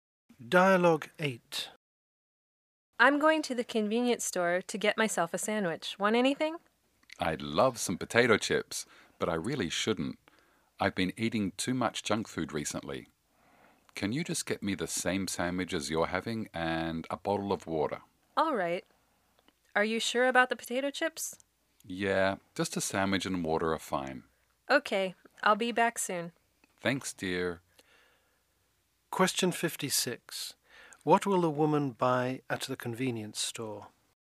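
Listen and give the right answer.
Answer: Two sandwiches and a bottle of water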